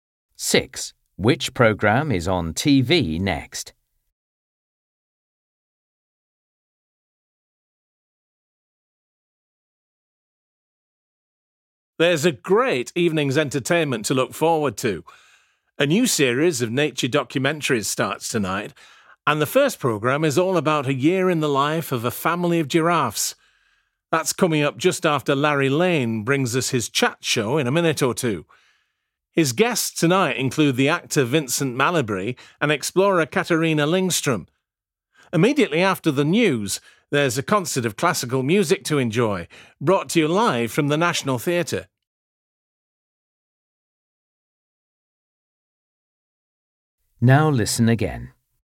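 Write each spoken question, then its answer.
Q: Which programme is on TV next?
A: Larry Lane's chat show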